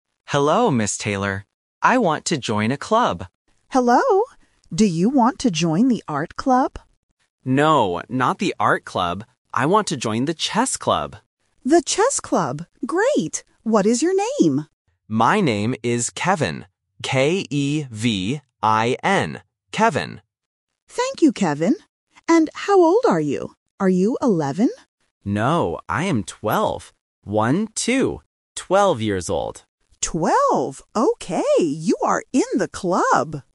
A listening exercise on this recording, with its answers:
Listen to the conversation between a student and a teacher. Choose the correct answer (A, B, or C).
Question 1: Which club does the boy want to join?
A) The Art Club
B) The Chess Club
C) The Music Club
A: The Chess Club

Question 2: How do you spell the boy's name?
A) K-A-V-I-N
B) C-E-V-I-N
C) K-E-V-I-N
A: K-E-V-I-N

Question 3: How old is the boy?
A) 11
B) 12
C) 20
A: 12

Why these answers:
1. The boy explicitly says, "I want to join the Chess Club." Option (A) is the trap because the teacher asks about the Art Club first, but the boy rejects it ("No, not the Art Club"). Option (C) is not mentioned.
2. The boy spells his name very clearly: "K-E-V-I-N". Options (A) and (B) are common phonetic spelling traps (A vs. E, C vs. K) designed to test A1 alphabet listening skills.
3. The boy says he is "twelve" and repeats it by saying "One-two". Option (A) is the trap because the teacher asks if he is eleven, but he says "No". Option (C) is a common number phonetic trap (twelve vs. twenty).

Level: A1

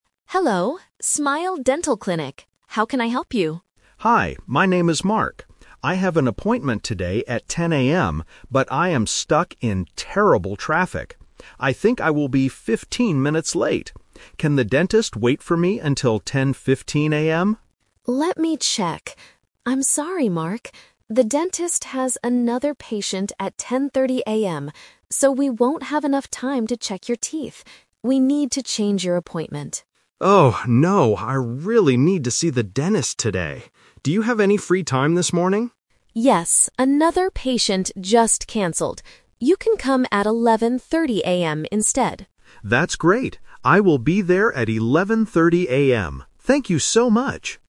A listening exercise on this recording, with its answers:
Listen to the conversation and choose the correct answer (A, B, or C).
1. Why is Mark calling the clinic?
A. To cancel his appointment.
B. To say he will be late.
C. To ask for the clinic's address.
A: To say he will be late.

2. Why can't the dentist see Mark at 10:15 AM?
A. The clinic closes at 10:30 AM.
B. The dentist has another patient.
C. The dentist is stuck in traffic.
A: The dentist has another patient.

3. What time is Mark's new appointment?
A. 10:00 AM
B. 10:30 AM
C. 11:30 AM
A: 11:30 AM

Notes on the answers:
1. Mark says, "I am stuck in terrible traffic. I think I will be fifteen minutes late." Option (A) is a trap because he actually wants to keep his appointment ("I really need to see the dentist today"). Option (C) is a plausible reason to call, but it is not mentioned.
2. The receptionist says, "The dentist has another patient at 10:30 AM." Option (A) is a trap because 10:30 AM is the time for the next patient, not the closing time. Option (C) is a trap because Mark is the one stuck in traffic, not the dentist.
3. The receptionist offers a new time and Mark says, "I will be there at 11:30 AM." Option (A) is a trap because 10:00 AM is his original appointment time. Option (B) is a trap because 10:30 AM is the time for the other patient.

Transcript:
Receptionist: Hello, Smile Dental Clinic. How can I help you?
Mark: Hi, my name is Mark. I have an appointment today at 10:00 AM. But I am stuck in terrible traffic. I think I will be fifteen minutes late. Can the dentist wait for me until 10:15 AM?
Receptionist: Let me check... I'm sorry, Mark. The dentist has another patient at 10:30 AM, so we won't have enough time to check your teeth. We need to change your appointment.
Mark: Oh, no. I really need to see the dentist today. Do you have any free time this morning?
Receptionist: Yes, another patient just canceled.

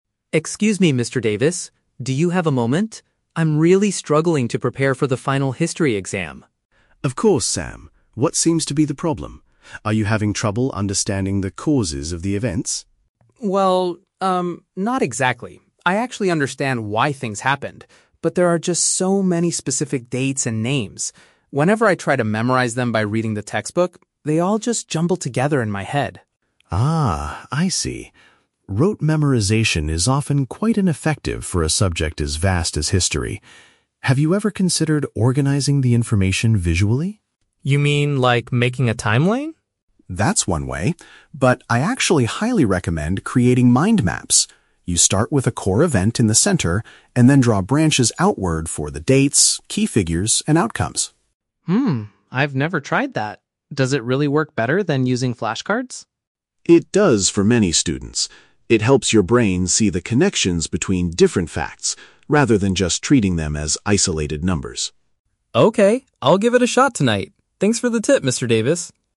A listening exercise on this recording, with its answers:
Listen to the conversation between a student and a teacher, then choose the correct answer (A, B, or C) for each question.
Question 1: What is Sam's main difficulty regarding the history exam?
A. He does not comprehend the reasons behind historical events.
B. He finds it challenging to recall specific factual details.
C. He accidentally lost his history textbook and notes.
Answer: He finds it challenging to recall specific factual details.

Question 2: What method does Mr. Davis suggest Sam should use?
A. Producing visual diagrams to link ideas together.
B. Designing a chronological timeline of events.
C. Taking extra practice tests before the final exam.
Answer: Producing visual diagrams to link ideas together.

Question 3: According to Mr. Davis, why is his suggested method effective?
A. It is much faster to create than traditional flashcards.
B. It forces students to read the entire textbook thoroughly.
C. It allows learners to observe how different pieces of information relate to each other.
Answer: It allows learners to observe how different pieces of information relate to each other.

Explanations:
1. Sam says, "there are just so many specific dates and names" and that they "jumble together" when he tries to memorize them. Option B perfectly paraphrases this as finding it challenging to recall factual details. Option A is a trap; Mr. Davis asks if he struggles with the causes, but Sam says, "I actually understand why things happened." Option C is never mentioned.
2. Mr. Davis recommends "creating mind maps" and drawing branches to organize information visually. Option A paraphrases this action without using the exact words. Option B is a trap; Sam asks if he means making a timeline, but Mr. Davis says he highly recommends mind maps instead. Option C is plausible for exam prep but is not mentioned in the audio.
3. Mr. Davis states that the method "helps your brain see the connections between different facts." Option C paraphrases this exactly (observe how different pieces of information relate). Option A is a trap; Sam mentions flashcards, but Mr. Davis never says mind maps are faster to make. Option B is not mentioned.

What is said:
Sam: Excuse me, Mr. Davis? Do you have a moment? I'm really struggling to prepare for the final history exam.
Mr. Davis: Of course, Sam. What seems to be the problem? Are you having trouble understanding the causes of the events?
not exactly. I actually understand why things happened. But there are just so many specific dates and names. Whenever I try to memorize them by reading the textbook, they all just jumble together in my head.
Mr. Davis: Ah, I see. Rote memorization is often quite ineffective for a subject as vast as history. Have you ever considered organizing the information visually?
Sam: You mean, like making a timeline?
Mr. Davis: That's one way, but I actually highly recommend creating mind maps. You start with a core event in the center, and then draw branches outward for the dates, key figures, and outcomes.
Sam: Hmm, I've never tried that. Does it really work better than using flashcards?
Mr. Davis: It does for many students. It helps your brain see the connections between different facts, rather than just treating them as isolated numbers.

